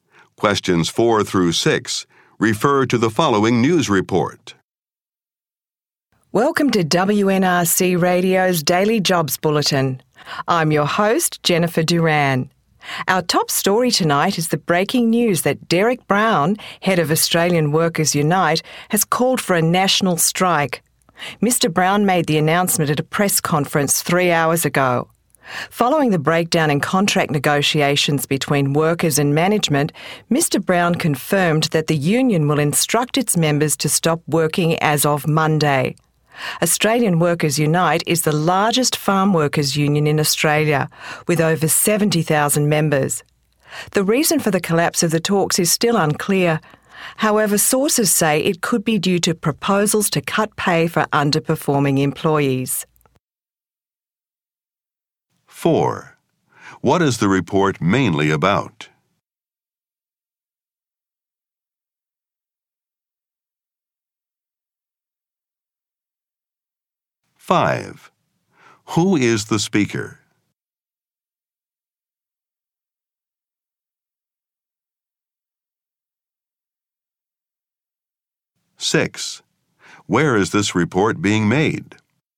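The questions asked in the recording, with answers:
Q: What is the report mainly about?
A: A national strike called by a farm workers union

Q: Who is the speaker?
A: Jennifer Duran, a radio host

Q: Where is this report being made?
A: On WNRC Radio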